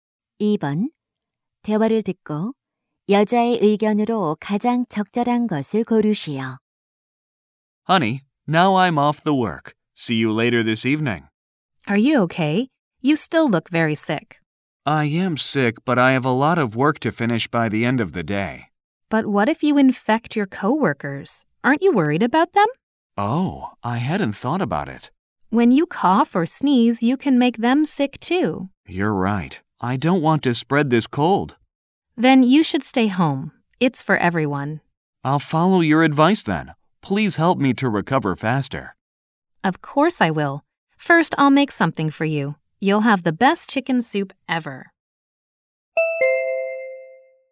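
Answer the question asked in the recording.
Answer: 감기에 걸렸으면 다른 사람에게 옮기지 않도록 집에서 쉬어야 한다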